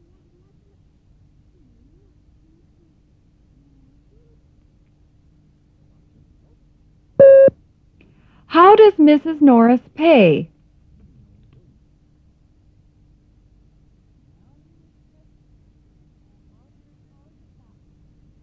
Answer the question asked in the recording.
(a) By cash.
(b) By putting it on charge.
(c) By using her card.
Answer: (b) By putting it on charge.